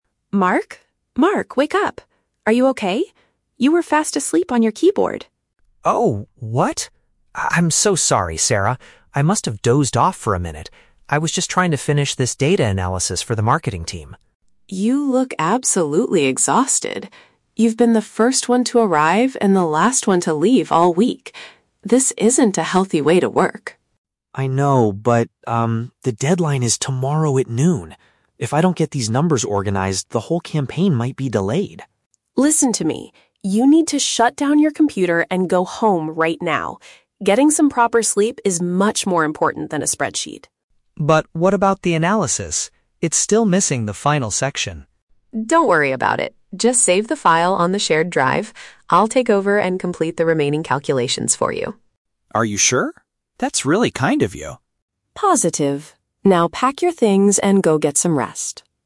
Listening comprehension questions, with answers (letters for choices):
Listen to the conversation between two colleagues (Sarah and Mark) and choose the correct answer (A, B, or C).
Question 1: Why is Sarah concerned about Mark at the beginning of the conversation?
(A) She caught him taking a nap at his workstation.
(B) He was the very last person to arrive at the office.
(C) He forgot to send an urgent email to their manager.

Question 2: Why is Mark refusing to stop working?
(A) He has to deliver a speech to the marketing team at noon.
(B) He is worried that the advertising project will be postponed.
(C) He is afraid the company will cancel his upcoming vacation.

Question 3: What does Sarah offer to do to help Mark?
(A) She will handle the rest of his unfinished assignments.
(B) She will contact the marketing team to ask for more time.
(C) She will drive him to his house so he can sleep safely.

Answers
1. A
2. B
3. A

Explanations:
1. Sarah wakes Mark up by saying, "You were fast asleep on your keyboard" and Mark admits he "dozed off." "Taking a nap at his workstation" is a paraphrase of falling asleep on the keyboard.
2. Mark says that if he doesn't finish, "the whole campaign might be delayed." "Advertising project" is a paraphrase of campaign, and "postponed" is a synonym for delayed.
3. Sarah tells Mark to go home and says, "I'll take over and complete the remaining calculations for you." "Handle the rest of his unfinished assignments" is a direct paraphrase of this offer.

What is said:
Sarah: Mark? Mark, wake up! Are you okay? You were fast asleep on your keyboard.
Mark: Oh... what? Ah, I'm so sorry, Sarah. I must have dozed off for a minute. I was just trying to finish this data analysis for the marketing team.
Sarah: You look absolutely exhausted. You've been the first one to arrive and the last one to leave all week. This isn't a healthy way to work.
Mark: I know, but, um, the deadline is tomorrow at noon. If I don't get these numbers organized, the whole campaign might be delayed.
Sarah: Listen to me. You need to shut down your computer and go home right now. Getting some proper sleep is much more important than a spreadsheet.
Mark: But what about the analysis? It's still missing the final section.
Sarah: Don't worry about it. Just save the file on the shared drive. I'll take over and complete the remaining calculations for you.
Mark: Are you sure? That's really kind of you.